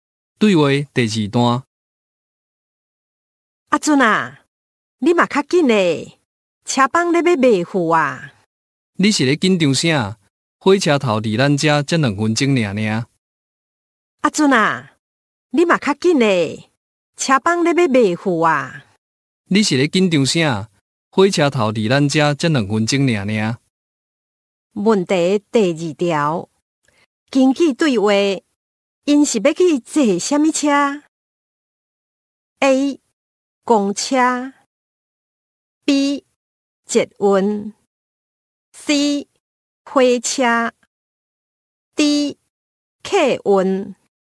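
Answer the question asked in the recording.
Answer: C: 火车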